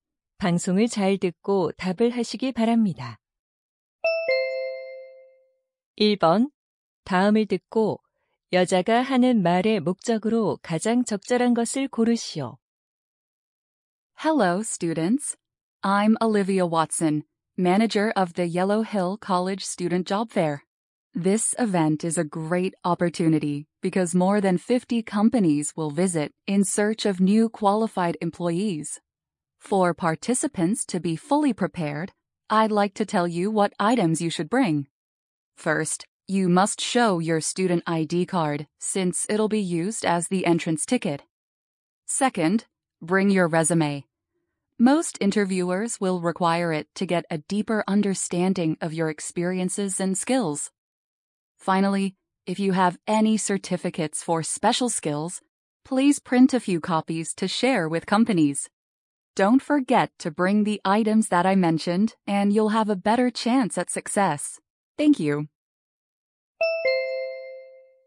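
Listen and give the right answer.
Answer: 취업 박람회에 가져올 준비물을 안내하려고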